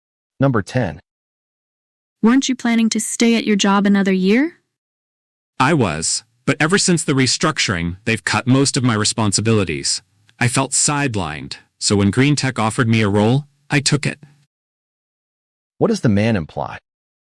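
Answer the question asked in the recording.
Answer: He took a job at Green Tech because he felt sidelined after the restructuring.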